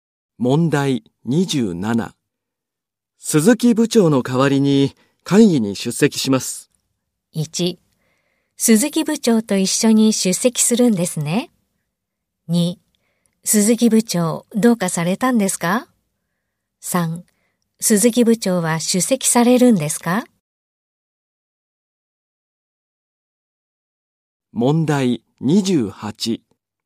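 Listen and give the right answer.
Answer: 2: 鈴木部長どうかされたんですか?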